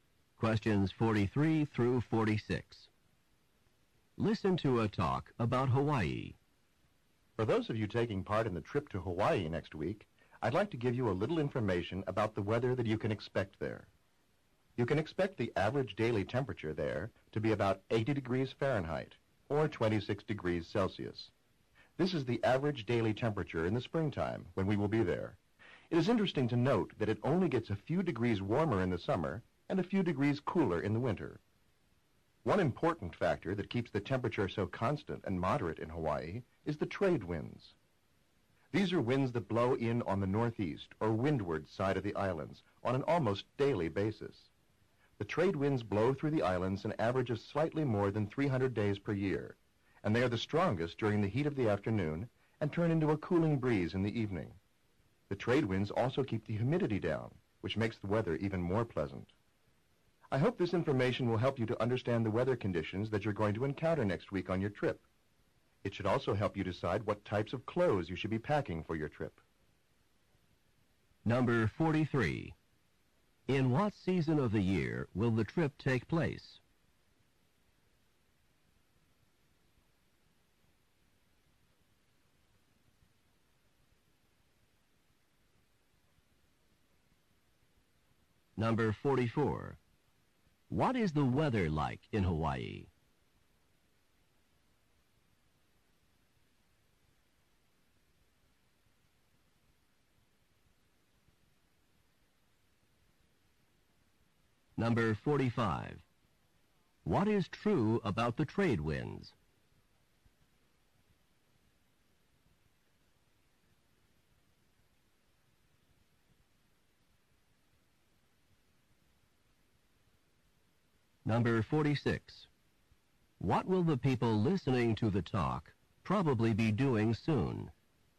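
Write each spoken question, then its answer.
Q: In what season of the year will the trip take place?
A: Spring

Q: What is the weather like in Hawaii?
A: Warm and fairly constant, about 80 degrees Fahrenheit

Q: What will the people listening to the talk probably be doing soon?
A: Packing for and taking a trip to Hawaii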